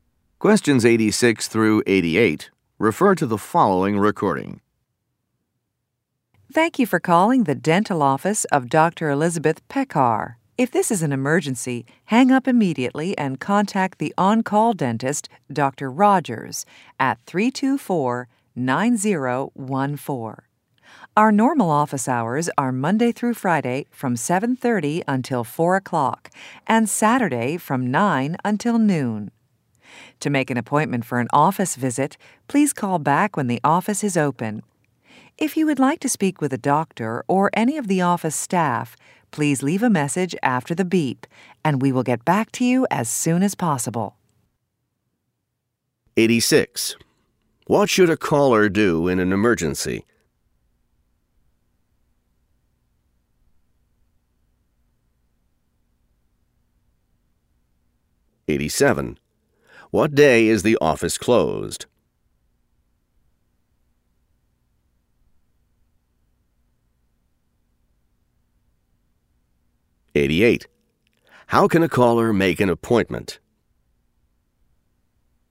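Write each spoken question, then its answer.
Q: What should a caller do in an emergency?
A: Call the on-call dentist, Dr. Rogers

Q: What day is the office closed?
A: Sunday

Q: How can a caller make an appointment?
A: Call back when the office is open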